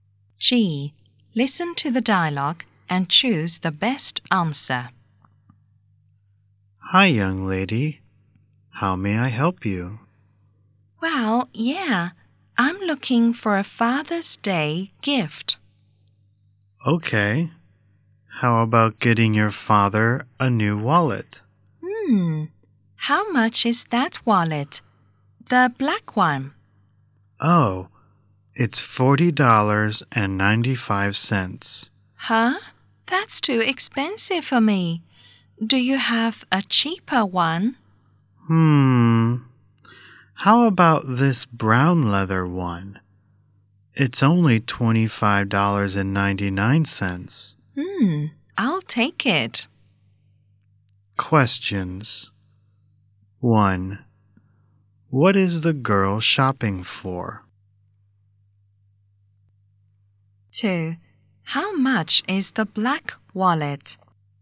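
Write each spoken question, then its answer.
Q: What is the girl shopping for?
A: A Father's Day gift (a wallet for her father)

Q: How much is the black wallet?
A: $40.95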